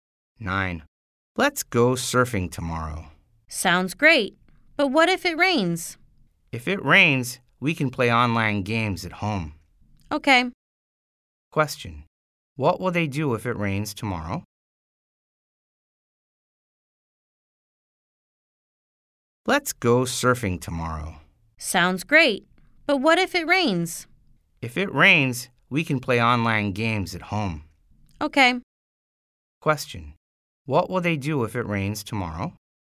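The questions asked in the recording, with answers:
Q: What will they do if it rains tomorrow?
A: Play online games at home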